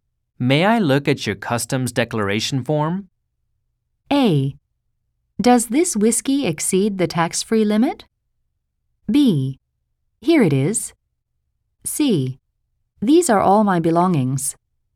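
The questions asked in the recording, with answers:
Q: May I look at your customs declaration form?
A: B: Here it is.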